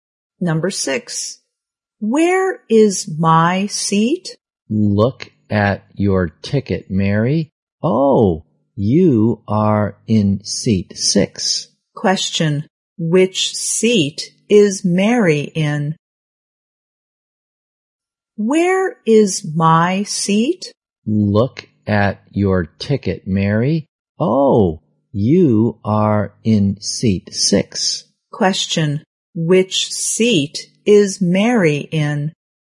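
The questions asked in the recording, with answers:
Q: Question, which seat is Mary in?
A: Seat six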